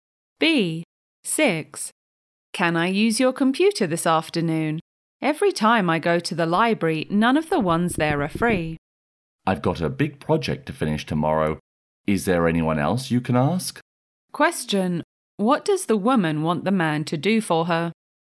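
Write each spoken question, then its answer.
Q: What does the woman want the man to do for her?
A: Let her use his computer this afternoon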